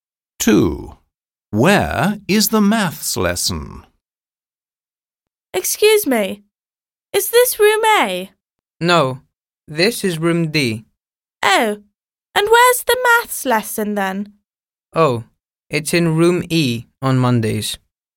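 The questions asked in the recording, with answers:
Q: Where is the maths lesson?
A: Room E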